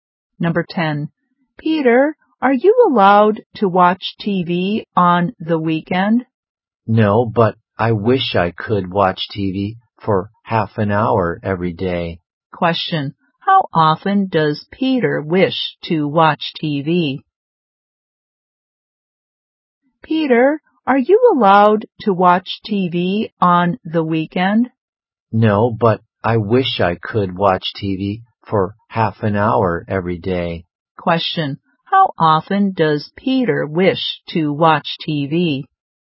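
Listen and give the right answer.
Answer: Every day (for half an hour)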